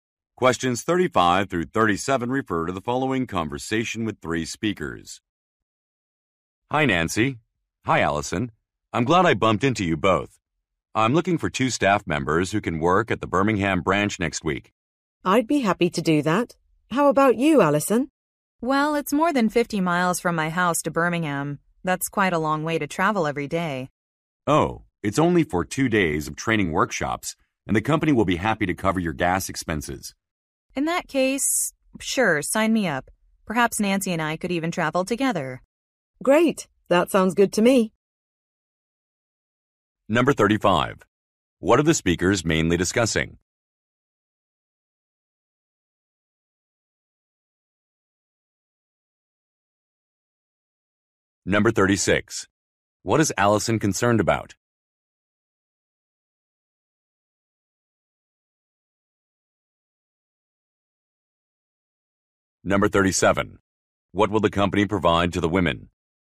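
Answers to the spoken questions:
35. Working at the Birmingham branch next week
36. The long distance to travel to Birmingham
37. Coverage of gas expenses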